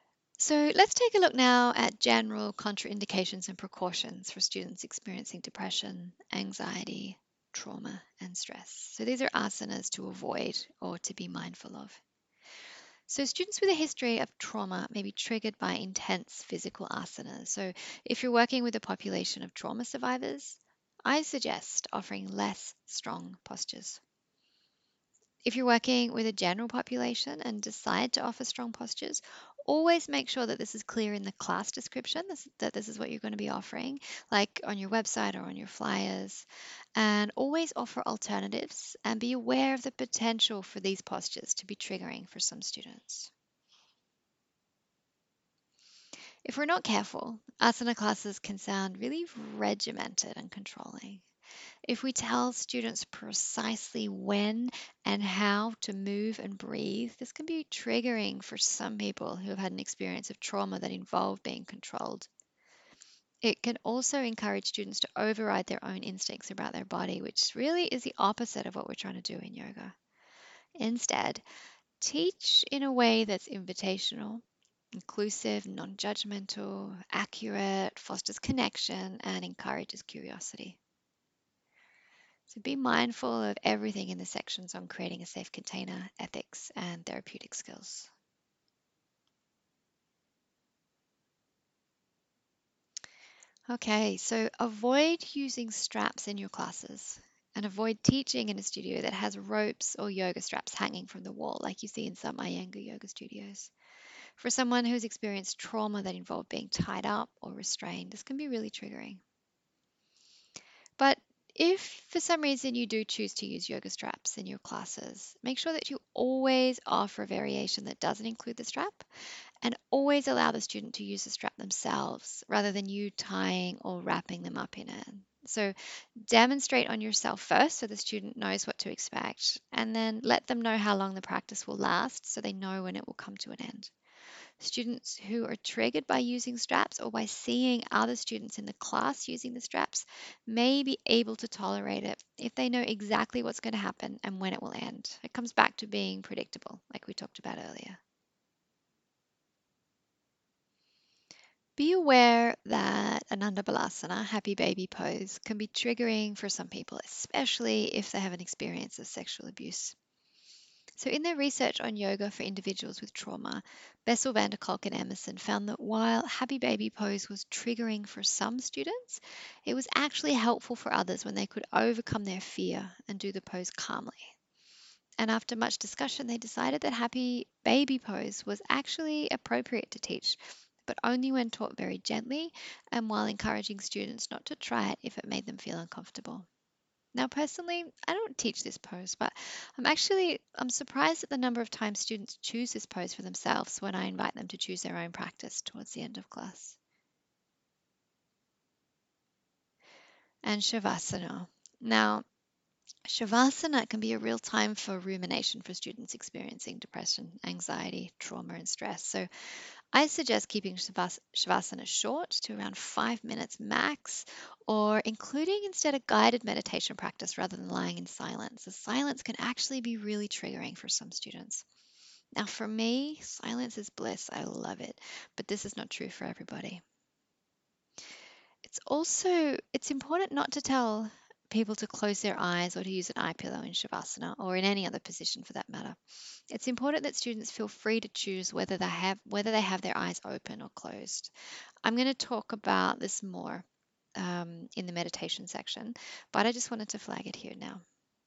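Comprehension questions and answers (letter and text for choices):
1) When teaching āsana, what do you need to be aware of for individuals with a history of trauma?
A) Students with a history of trauma might be triggered by intense physical āsanas.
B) Students with a history of trauma that involved being tied up or restrained might be triggered by the use of yoga straps in class.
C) Ānanda balāsana might be triggering for some people who have experienced sexual trauma.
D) All of the above.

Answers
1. D) All of the above.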